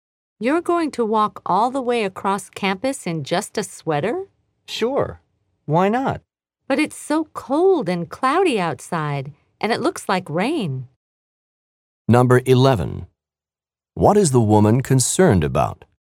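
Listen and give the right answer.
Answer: That the man will be cold or get wet in only a sweater.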